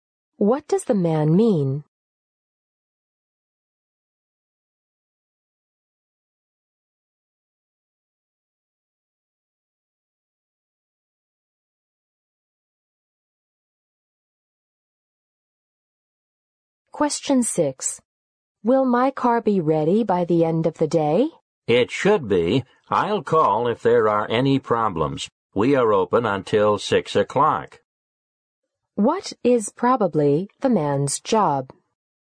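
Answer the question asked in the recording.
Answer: A car mechanic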